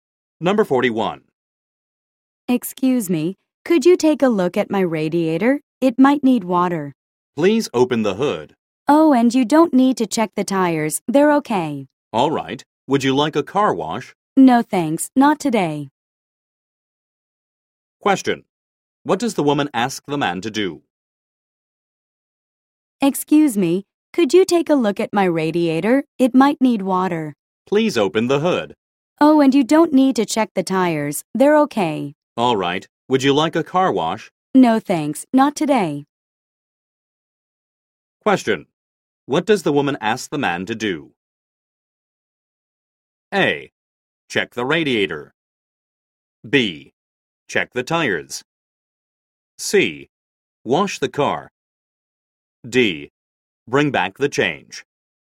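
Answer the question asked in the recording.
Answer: A: Check the radiator.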